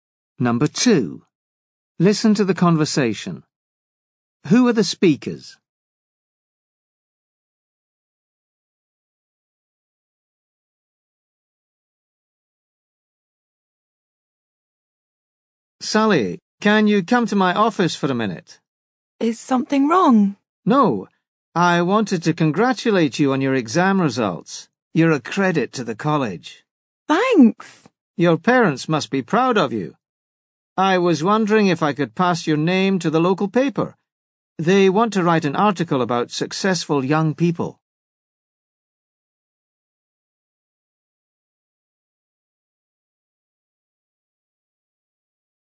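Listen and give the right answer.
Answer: A college teacher and a student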